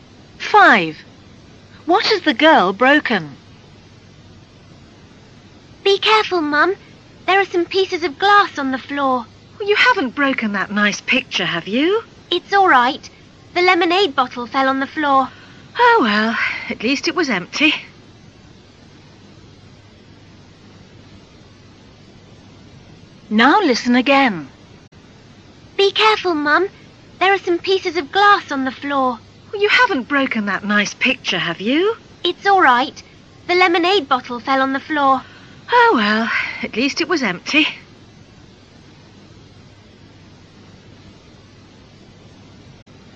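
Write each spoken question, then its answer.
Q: What has the girl broken?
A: The lemonade bottle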